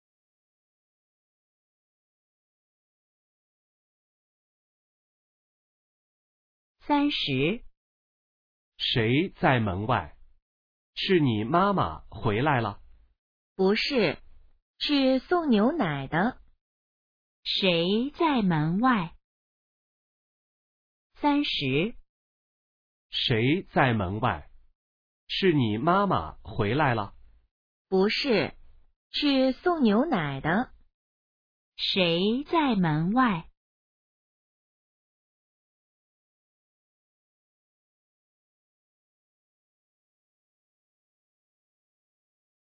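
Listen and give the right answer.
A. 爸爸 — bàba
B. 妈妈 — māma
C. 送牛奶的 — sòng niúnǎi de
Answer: C. 送牛奶的 — sòng niúnǎi de

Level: HSK2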